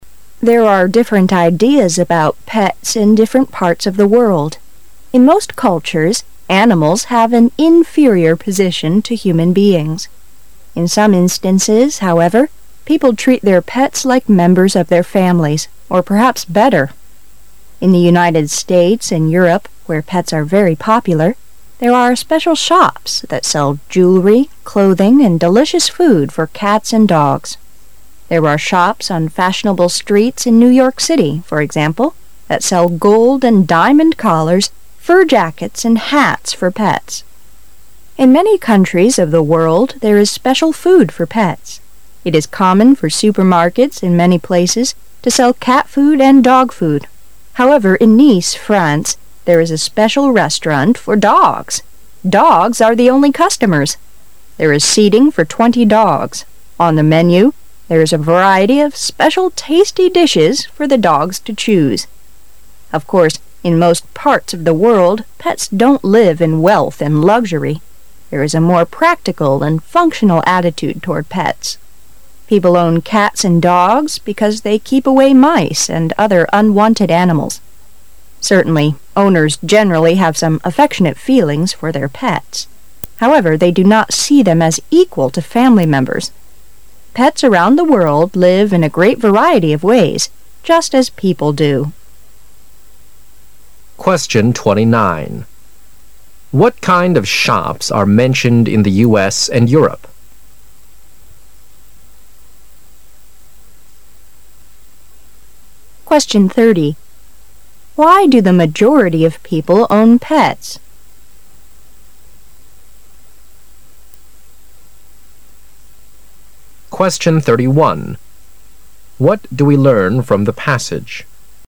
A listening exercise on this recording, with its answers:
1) Why do the majority of people own pets?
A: To keep away unwanted animals.

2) What do we learn from the passage?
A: Pet owners have some tender feelings for their pets.

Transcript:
[解析] 29-31 There are different ideas about pets in different parts of the world. In most cultures, animals have an inferior position to human beings. In some instances, however, people treat their pets like members of their families, or perhaps better. In the United States and Europe, where pets are very popular, there are special shops that sell jewelry, clothing and delicious food for cats and dogs. There are shops on fashionable streets in New York City, for example, that sell gold and diamond collars, fur jackets, and hats for pets. In many countries of the world, there is special food for pets. It is common for supermarkets in many places to sell cat food and dog food. However, in Nice, France, there is a special restaurant for dogs.. Dogs are the only customers. There is seating for twenty dogs, On the menu, there is a variety of special tasty dishes for the dogs to choose. Of course, in most parts of the world, pets don't live in wealth and luxury. There is a more practical and functional attitude toward pets. People own cats and dogs because they keep away mice and other unwanted animals. Certainly, owners generally have some affectionate feelings for their pets. However, they do not see them as equal to family members. Pets around the world live in a great variety of ways, just as people do. What kind of shops are mentioned in the U.S. and Europe?